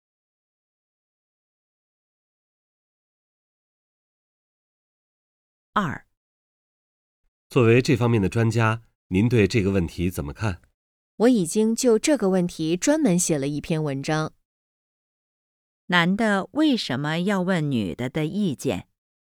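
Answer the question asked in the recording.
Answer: 因为女的是这方面的专家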